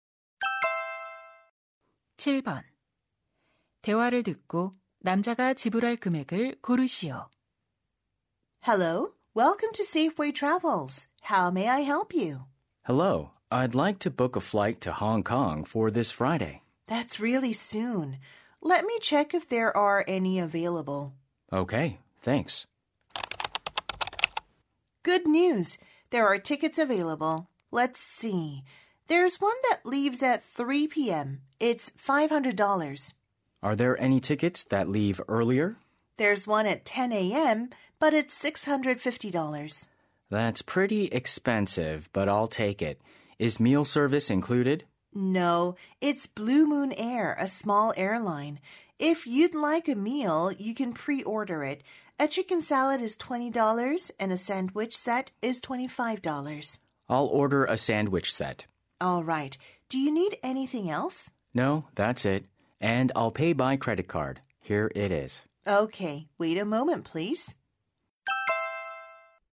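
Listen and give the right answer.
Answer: $675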